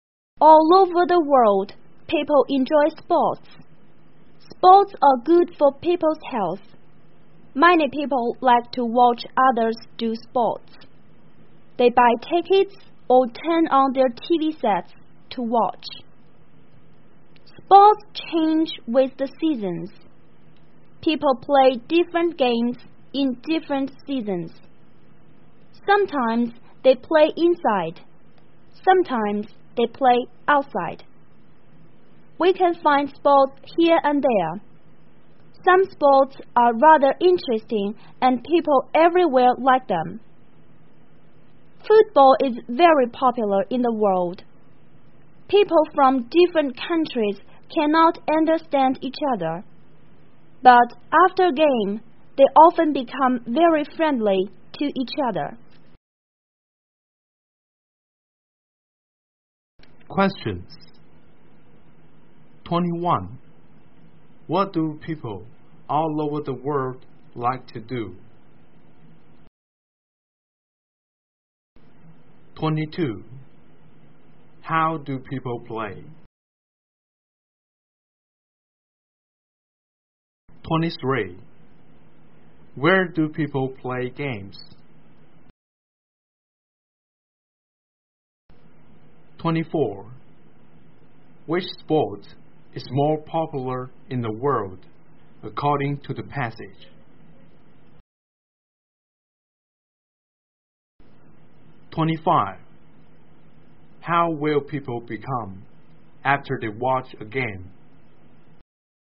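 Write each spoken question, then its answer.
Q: What do people all over the world like to do?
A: Enjoy sports

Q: Which sport is more popular in the world according to the passage?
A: Football

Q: How will people become after they watch a game?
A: Very friendly to each other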